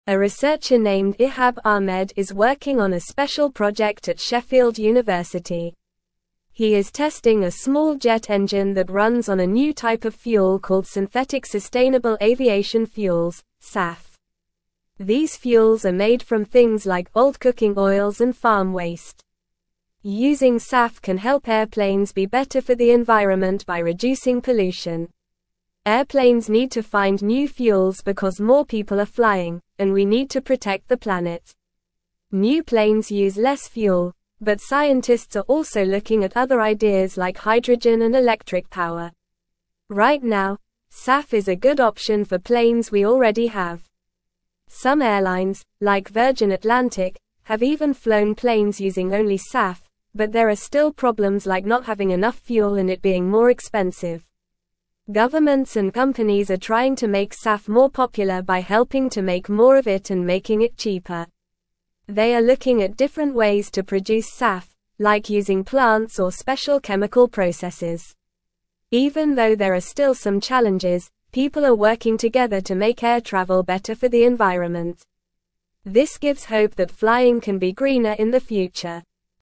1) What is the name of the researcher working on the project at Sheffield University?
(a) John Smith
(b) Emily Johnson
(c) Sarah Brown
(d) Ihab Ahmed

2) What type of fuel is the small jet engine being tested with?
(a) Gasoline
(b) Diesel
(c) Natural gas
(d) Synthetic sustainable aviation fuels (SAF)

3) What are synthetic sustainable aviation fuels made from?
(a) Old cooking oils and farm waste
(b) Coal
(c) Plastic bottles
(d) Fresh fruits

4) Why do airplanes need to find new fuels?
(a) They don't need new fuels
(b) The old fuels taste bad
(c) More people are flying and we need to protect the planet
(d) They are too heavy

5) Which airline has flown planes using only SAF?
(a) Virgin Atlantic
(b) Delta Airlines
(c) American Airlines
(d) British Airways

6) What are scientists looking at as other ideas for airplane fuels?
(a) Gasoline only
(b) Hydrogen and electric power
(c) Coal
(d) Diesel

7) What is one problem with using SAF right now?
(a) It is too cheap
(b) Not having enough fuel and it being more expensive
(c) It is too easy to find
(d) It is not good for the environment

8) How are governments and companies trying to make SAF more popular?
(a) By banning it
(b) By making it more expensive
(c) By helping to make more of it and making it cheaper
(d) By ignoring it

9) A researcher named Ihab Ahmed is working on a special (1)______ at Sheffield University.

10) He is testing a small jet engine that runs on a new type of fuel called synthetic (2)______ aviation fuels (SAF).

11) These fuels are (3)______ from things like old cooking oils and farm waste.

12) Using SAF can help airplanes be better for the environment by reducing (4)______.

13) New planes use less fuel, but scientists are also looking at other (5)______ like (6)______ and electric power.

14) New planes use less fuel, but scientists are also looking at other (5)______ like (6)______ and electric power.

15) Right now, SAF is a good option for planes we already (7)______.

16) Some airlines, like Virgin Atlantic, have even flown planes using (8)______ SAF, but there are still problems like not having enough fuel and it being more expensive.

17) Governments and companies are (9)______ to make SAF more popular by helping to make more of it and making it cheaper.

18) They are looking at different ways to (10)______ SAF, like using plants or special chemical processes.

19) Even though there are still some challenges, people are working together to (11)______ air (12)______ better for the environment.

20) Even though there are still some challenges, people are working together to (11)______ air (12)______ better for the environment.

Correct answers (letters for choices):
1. d
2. d
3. a
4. c
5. a
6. b
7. b
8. c
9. project
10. sustainable
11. made
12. pollution
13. ideas
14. hydrogen
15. have
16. only
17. trying
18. produce
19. make
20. travel

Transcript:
A researcher named Ihab Ahmed is working on a special project at Sheffield University. He is testing a small jet engine that runs on a new type of fuel called synthetic sustainable aviation fuels (SAF). These fuels are made from things like old cooking oils and farm waste. Using SAF can help airplanes be better for the environment by reducing pollution.
Airplanes need to find new fuels because more people are flying, and we need to protect the planet. New planes use less fuel, but scientists are also looking at other ideas like hydrogen and electric power. Right now, SAF is a good option for planes we already have. Some airlines, like Virgin Atlantic, have even flown planes using only SAF, but there are still problems like not having enough fuel and it being more expensive.
Governments and companies are trying to make SAF more popular by helping to make more of it and making it cheaper. They are looking at different ways to produce SAF, like using plants or special chemical processes. Even though there are still some challenges, people are working together to make air travel better for the environment. This gives hope that flying can be greener in the future.

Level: Level 2